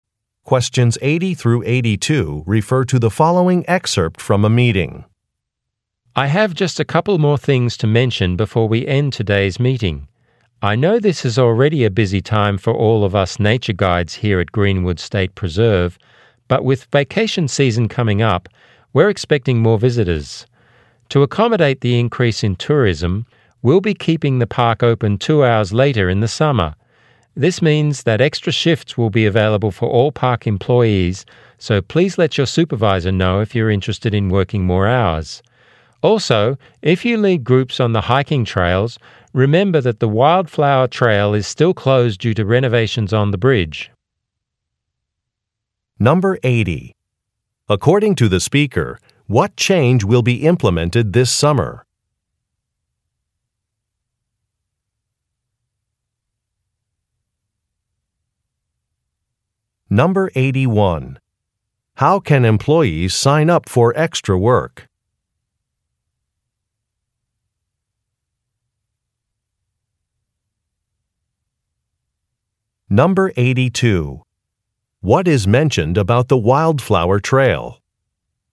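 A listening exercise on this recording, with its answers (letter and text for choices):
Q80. According to the speaker, what change will be implemented this summer?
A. A gift shop will be added.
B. Hours will be extended.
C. Admission prices will rise.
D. Programs for families will start.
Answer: B. Hours will be extended.

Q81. How can employees sign up for extra work?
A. By registering online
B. By calling the park office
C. By submitting a written request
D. By speaking to a supervisor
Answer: D. By speaking to a supervisor

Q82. What is mentioned about the Wildflower trail?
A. It has been expanded.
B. It is designed for children.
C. It is currently closed.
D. Its flowers are in full bloom.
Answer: C. It is currently closed.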